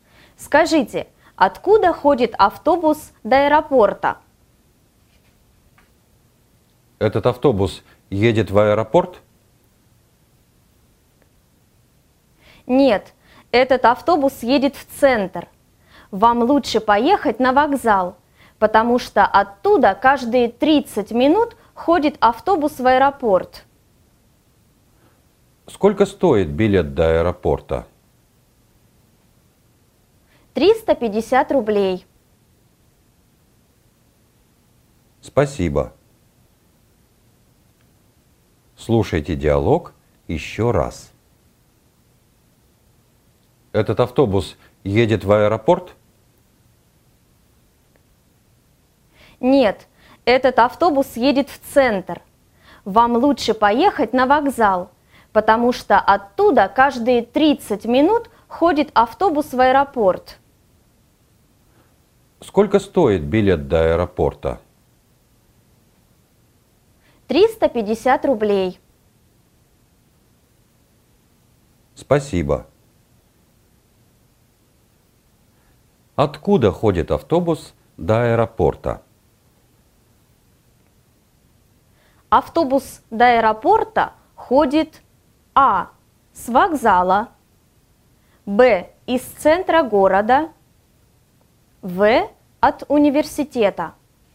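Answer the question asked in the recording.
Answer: А: с вокзала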